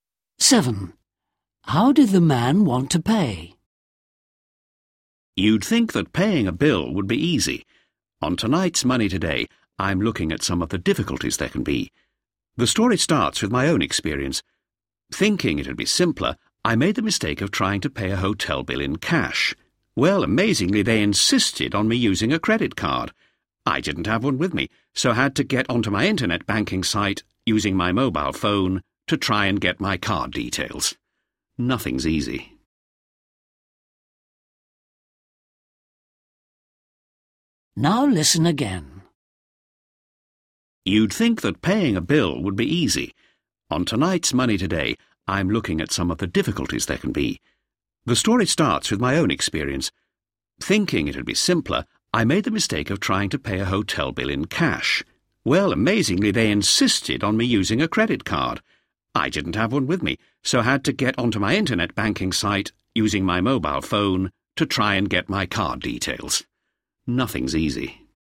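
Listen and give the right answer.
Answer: in cash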